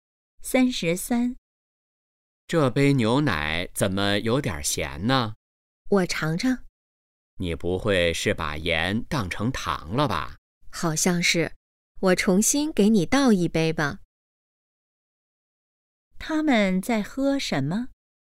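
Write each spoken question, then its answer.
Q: 他们在喝什么?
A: 牛奶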